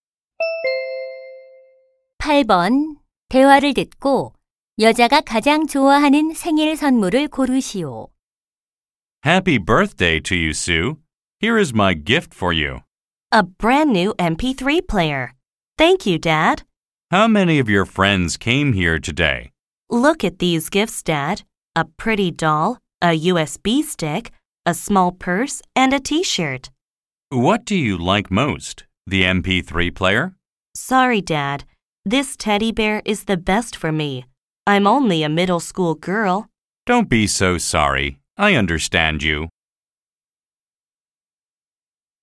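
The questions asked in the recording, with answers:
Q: 대화를 듣고 여자가 가장 좋아하는 생일 선물을 고르시오.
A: 곰 인형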